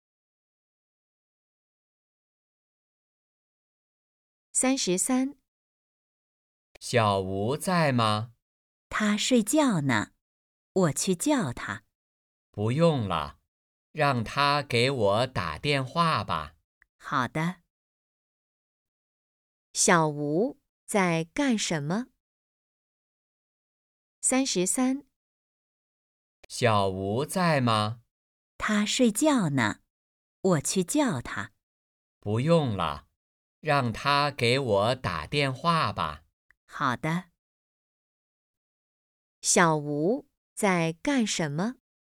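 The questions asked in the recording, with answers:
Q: 小吴在干什么?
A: 睡觉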